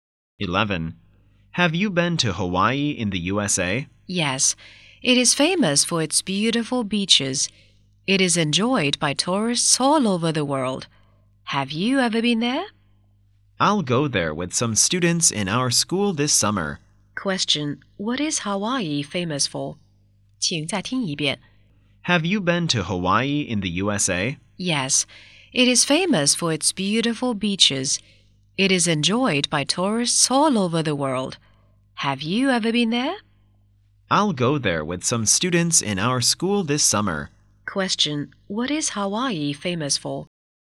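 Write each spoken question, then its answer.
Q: Question. What is Hawaii famous for?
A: Its beautiful beaches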